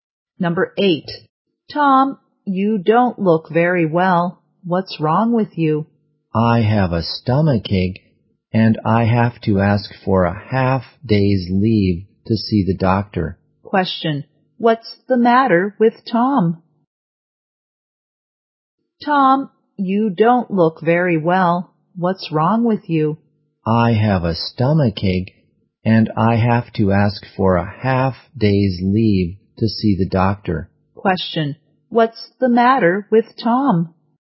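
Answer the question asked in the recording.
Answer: He has a stomachache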